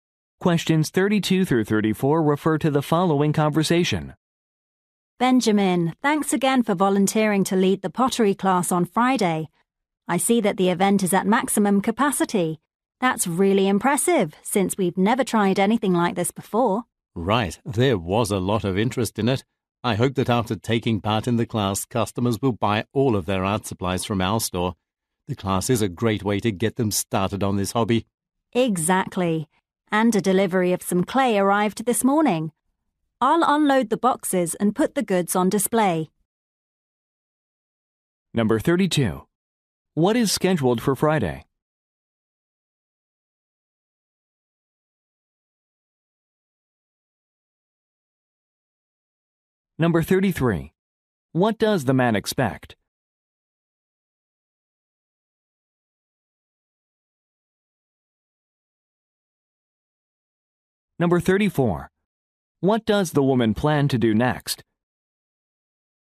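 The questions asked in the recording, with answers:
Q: What is scheduled for Friday?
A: A pottery class

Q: What does the man expect?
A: Customers will buy all their art supplies from the store

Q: What does the woman plan to do next?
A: Unload the clay boxes and put the goods on display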